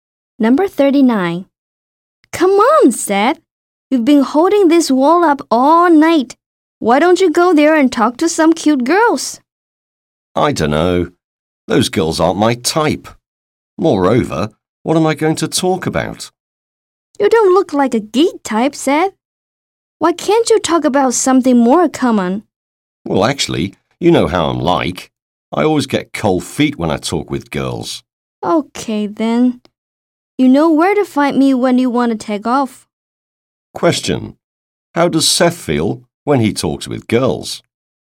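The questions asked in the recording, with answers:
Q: How does Seth feel when he talks with girls?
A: Nervous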